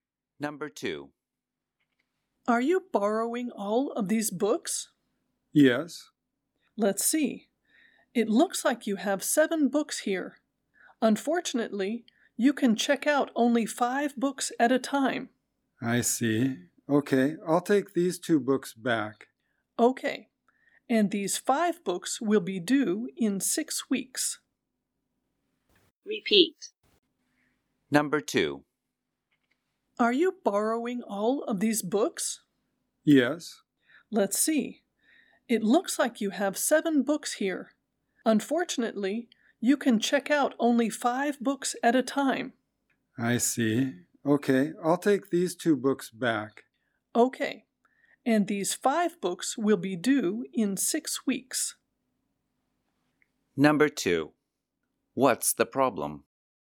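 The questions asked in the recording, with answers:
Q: What's the problem?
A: The person wants to borrow 7 books, but only 5 books can be checked out at a time.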